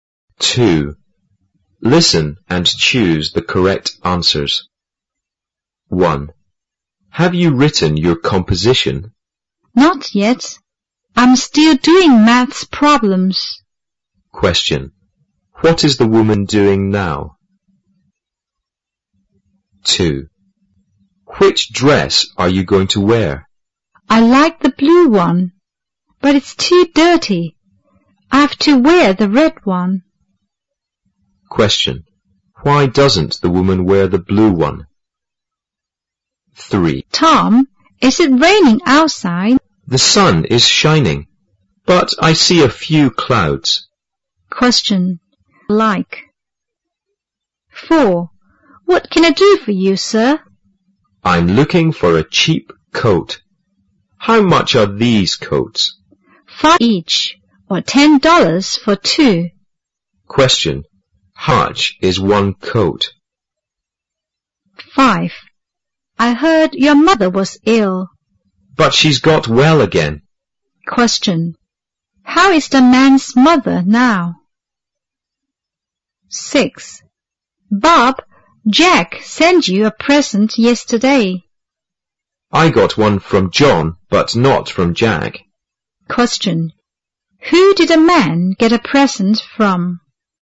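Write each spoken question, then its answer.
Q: Question. What is the woman doing now?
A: Doing maths problems

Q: Question. Why doesn't the woman wear the blue one?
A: It's too dirty

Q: Question. How is the man's mother now?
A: She's well again

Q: Question. Who did a man get a present from?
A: John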